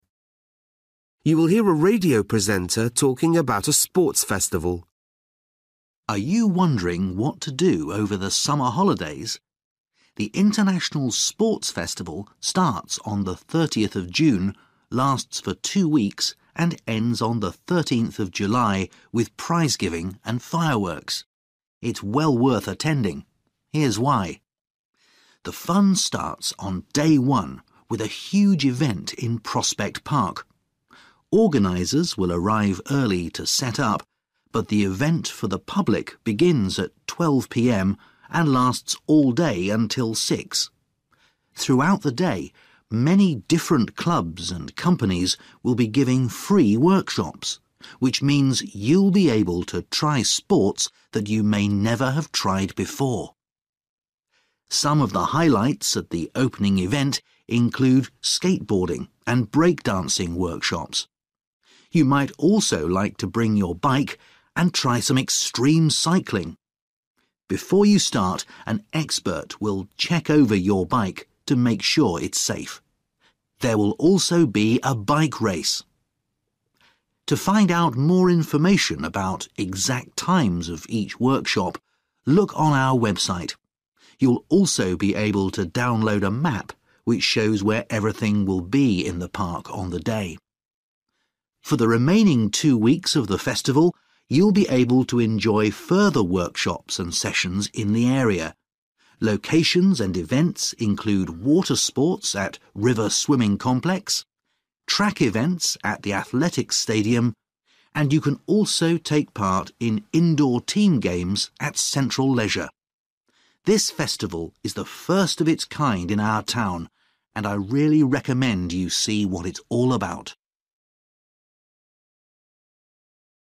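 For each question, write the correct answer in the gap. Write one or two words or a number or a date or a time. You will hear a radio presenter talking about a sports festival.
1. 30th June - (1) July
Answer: 13th

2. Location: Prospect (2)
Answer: Park

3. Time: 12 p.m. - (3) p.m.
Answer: 6

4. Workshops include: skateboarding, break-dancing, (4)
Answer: extreme cycling

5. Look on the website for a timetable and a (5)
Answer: map

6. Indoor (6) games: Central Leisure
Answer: team

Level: Luyện nghe trình độ B1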